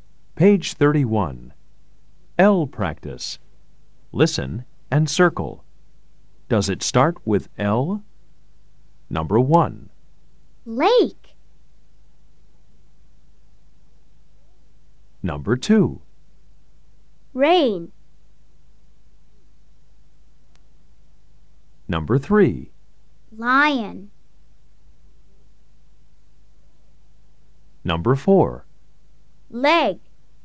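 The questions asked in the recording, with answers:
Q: Lake.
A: Yes

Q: Rain.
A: No

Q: Lion.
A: Yes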